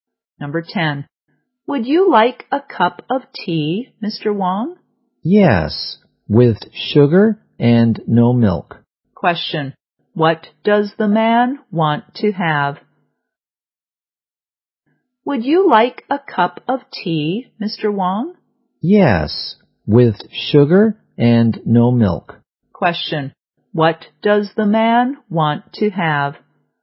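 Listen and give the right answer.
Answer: Tea with sugar and no milk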